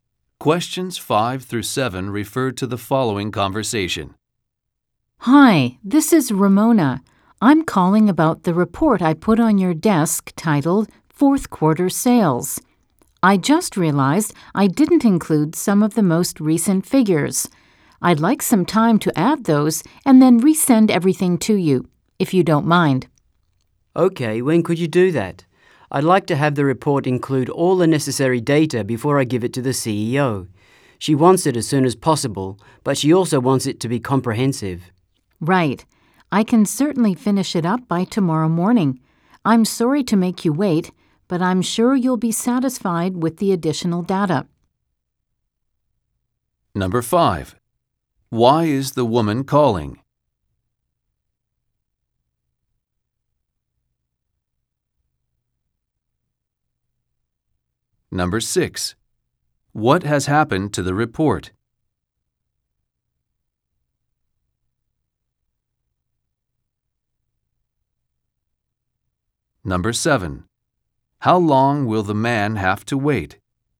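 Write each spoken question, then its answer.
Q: Why is the woman calling?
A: To ask for time to add recent figures to her report

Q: What has happened to the report?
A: Some of the most recent figures were left out

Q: How long will the man have to wait?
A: Until tomorrow morning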